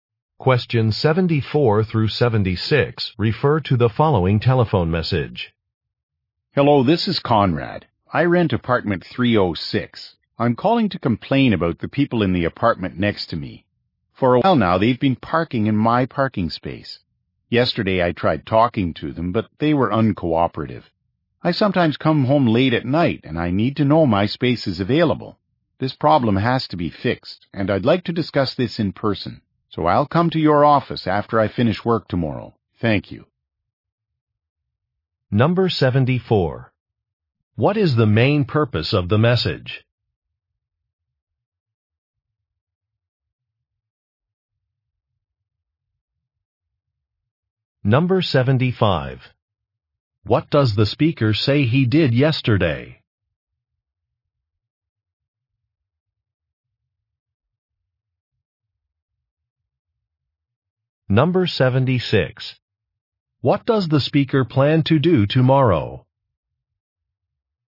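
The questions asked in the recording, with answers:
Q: What is the main purpose of the message?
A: To complain about neighbors parking in his parking space

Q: What does the speaker say he did yesterday?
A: He tried talking to his neighbors

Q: What does the speaker plan to do tomorrow?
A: Come to the office after work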